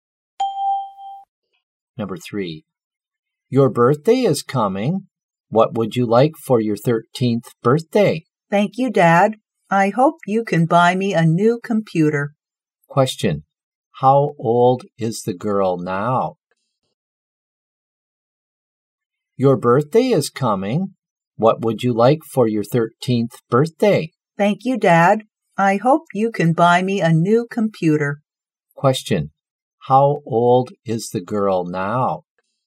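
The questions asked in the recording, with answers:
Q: how old is the girl now?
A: 12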